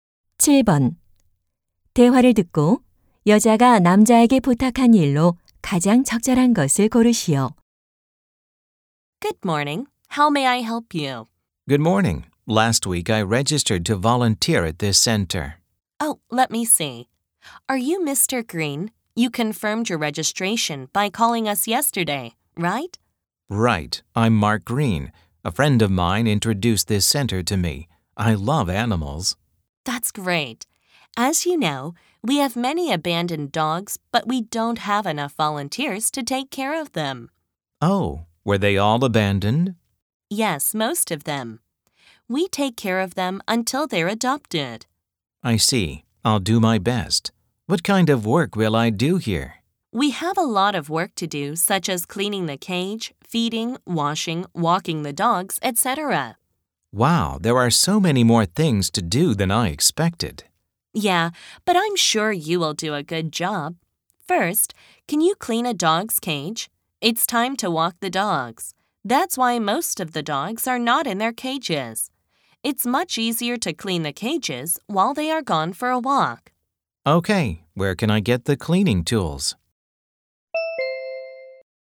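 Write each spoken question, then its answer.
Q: 대화를 듣고 여자가 남자에게 부탁한 일로 가장 적절한 것을 고르시오.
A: 개 우리 청소하기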